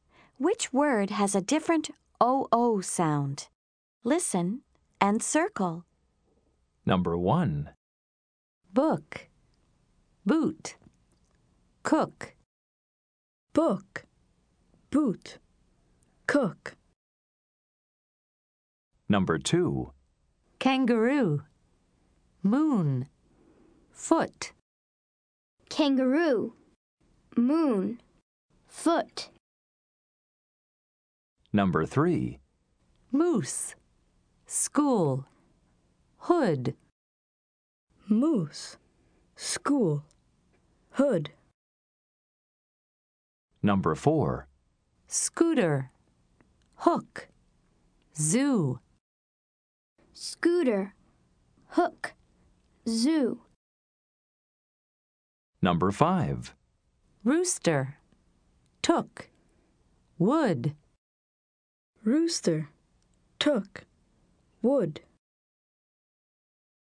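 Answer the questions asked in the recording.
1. Boot
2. Foot
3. Hood
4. Hook
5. Rooster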